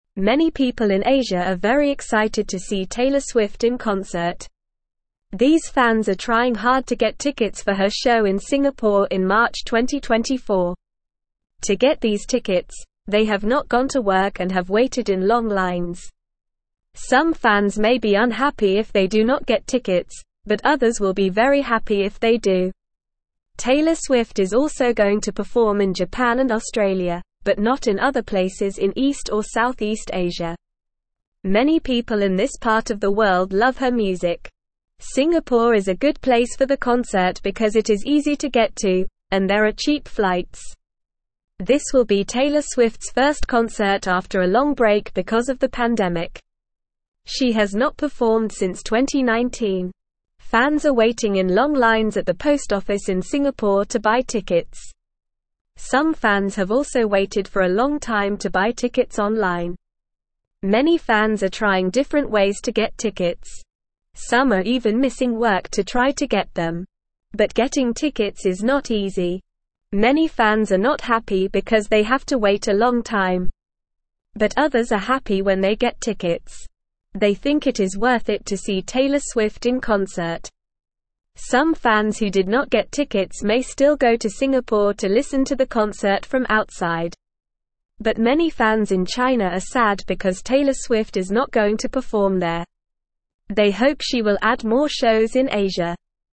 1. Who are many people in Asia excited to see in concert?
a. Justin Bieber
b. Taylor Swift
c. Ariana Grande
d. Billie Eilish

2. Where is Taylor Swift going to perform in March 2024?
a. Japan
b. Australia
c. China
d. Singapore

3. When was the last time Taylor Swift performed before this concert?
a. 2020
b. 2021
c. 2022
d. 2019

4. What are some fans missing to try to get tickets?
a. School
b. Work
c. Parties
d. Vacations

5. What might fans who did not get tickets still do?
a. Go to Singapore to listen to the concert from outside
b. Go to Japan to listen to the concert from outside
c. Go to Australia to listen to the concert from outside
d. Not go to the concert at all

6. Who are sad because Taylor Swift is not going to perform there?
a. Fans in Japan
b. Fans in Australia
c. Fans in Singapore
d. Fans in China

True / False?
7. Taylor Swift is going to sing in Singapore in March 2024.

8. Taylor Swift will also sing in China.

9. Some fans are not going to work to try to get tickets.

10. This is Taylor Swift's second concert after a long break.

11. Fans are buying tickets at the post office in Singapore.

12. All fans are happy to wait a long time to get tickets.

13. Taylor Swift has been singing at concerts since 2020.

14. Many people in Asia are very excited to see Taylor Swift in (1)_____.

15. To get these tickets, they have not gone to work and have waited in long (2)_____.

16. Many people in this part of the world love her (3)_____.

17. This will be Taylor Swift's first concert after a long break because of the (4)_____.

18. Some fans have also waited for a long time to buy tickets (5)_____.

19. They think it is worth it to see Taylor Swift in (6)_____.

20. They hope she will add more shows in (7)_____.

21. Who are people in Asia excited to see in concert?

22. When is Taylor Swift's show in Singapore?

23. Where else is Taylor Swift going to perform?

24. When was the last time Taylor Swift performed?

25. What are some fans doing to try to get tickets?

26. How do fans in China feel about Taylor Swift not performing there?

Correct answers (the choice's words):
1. Taylor Swift
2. Singapore
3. 2019
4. Work
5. Go to Singapore to listen to the concert from outside
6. Fans in China
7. True
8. False
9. True
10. False
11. True
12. False
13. False
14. concert
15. lines
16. music
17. pandemic
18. online
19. concert
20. Asia
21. People in Asia are excited to see Taylor Swift in concert.
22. Taylor Swift's show in Singapore is in March 2024.
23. Taylor Swift is also going to perform in Japan and Australia.
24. The last time Taylor Swift performed was in 2019.
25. Some fans are missing work and waiting in long lines to try to get tickets.
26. Fans in China are sad because Taylor Swift is not going to perform there.

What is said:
Many people in Asia are very excited to see Taylor Swift in concert. These fans are trying hard to get tickets for her show in Singapore in March 2024. To get these tickets, they have not gone to work and have waited in long lines. Some fans may be unhappy if they do not get tickets, but others will be very happy if they do.
Taylor Swift is also going to perform in Japan and Australia, but not in other places in East or South East Asia. Many people in this part of the world love her music. Singapore is a good place for the concert because it is easy to get to, and there are cheap flights.
This will be Taylor Swift's first concert after a long break because of the pandemic. She has not performed since 2019. Fans are waiting in long lines at the post office in Singapore to buy tickets. Some fans have also waited for a long time to buy tickets online.
Many fans are trying different ways to get tickets. Some are even missing work to try to get them. But getting tickets is not easy. Many fans are not happy because they have to wait a long time. But others are happy when they get tickets. They think it is worth it to see Taylor Swift in concert.
Some fans who did not get tickets may still go to Singapore to listen to the concert from outside. But many fans in China are sad because Taylor Swift is not going to perform there. They hope she will add more shows in Asia.

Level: Level 1